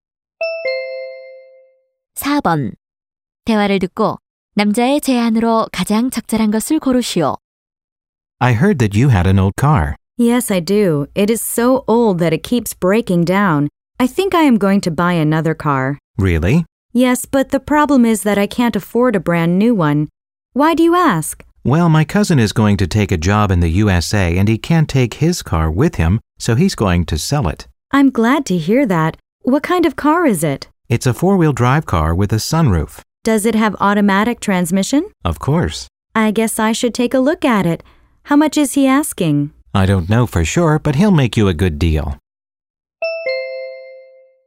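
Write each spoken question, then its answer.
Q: 대화를 듣고 남자의 제안으로 가장 적절한 것을 고르시오.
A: 사촌의 중고차를 사라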